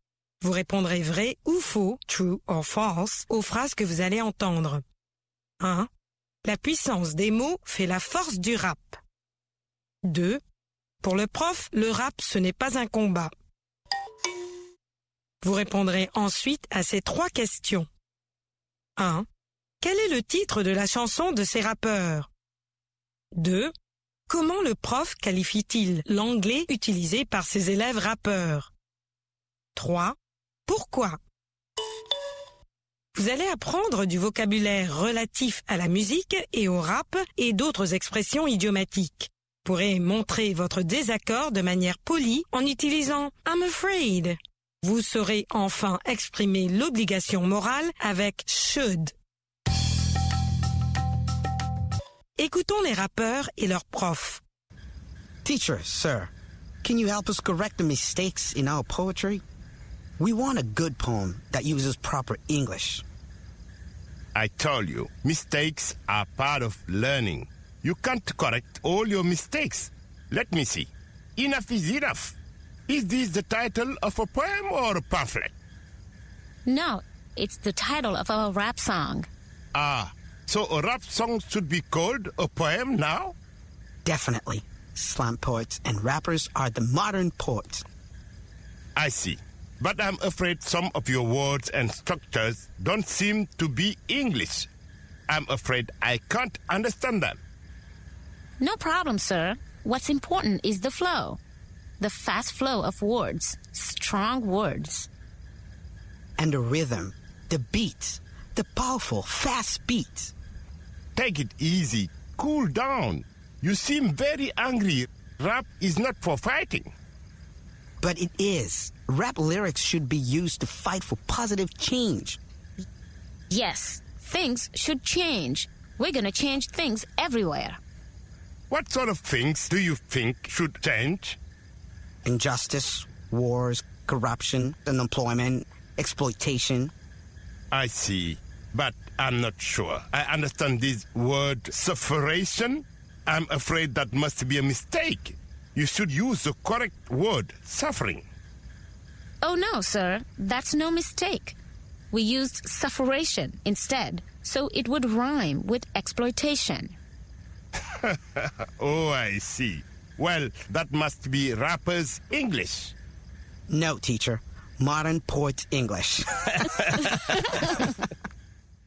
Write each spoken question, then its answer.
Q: La puissance des mots fait la force du rap.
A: L'énoncé 1 est vrai. La puissance des mots fait la force du rap.

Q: Pour le prof, le rap, ce n'est pas un combat.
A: L'énoncé 2 est vrai. Pour le prof, le rap, ce n'est pas un combat.

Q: Quel est le titre de la chanson de ces rappeurs?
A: Enough is enough.

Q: Comment le prof qualifie-t-il l'anglais utilisé par ses élèves rappeurs?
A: D'anglais de rappeur.